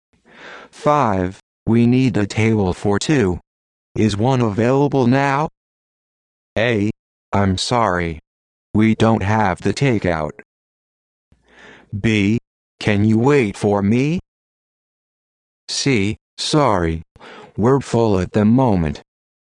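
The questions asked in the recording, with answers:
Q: We need a table for two.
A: C: Sorry. We're full at the moment.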